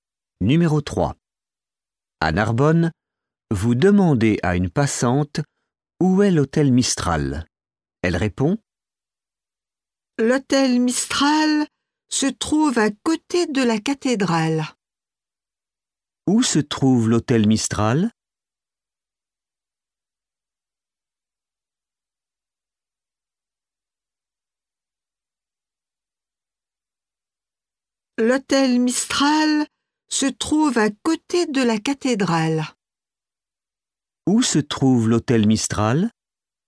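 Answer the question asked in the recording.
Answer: À côté de la cathédrale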